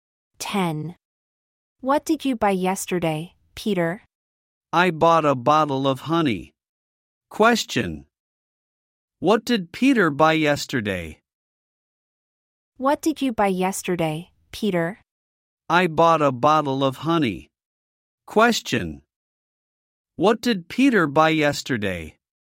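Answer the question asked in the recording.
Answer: A bottle of honey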